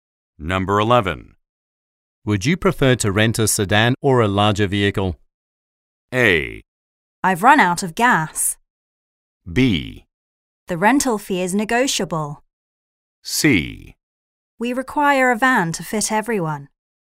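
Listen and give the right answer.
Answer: C: We require a van to fit everyone.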